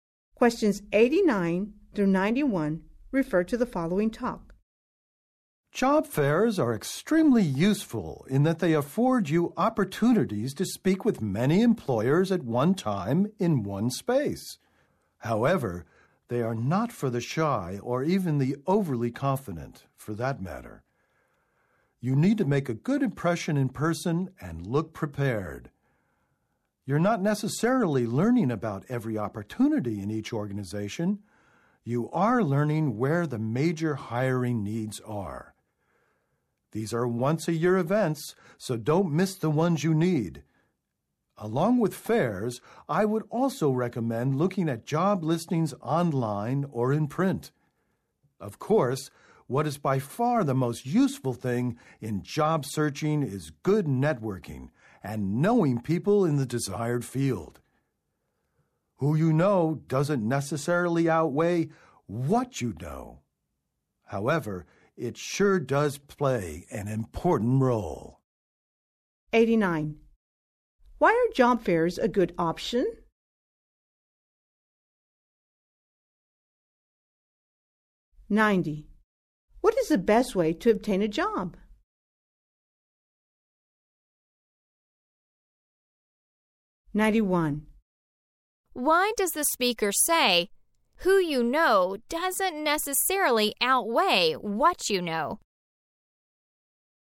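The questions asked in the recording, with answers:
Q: Why are job fairs a good option?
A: You can speak with many employers at one time

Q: What is the best way to obtain a job?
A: Good networking and knowing people in the field

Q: Why does the speaker say, who you know doesn't necessarily outweigh what you know?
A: Knowledge still matters, though contacts play an important role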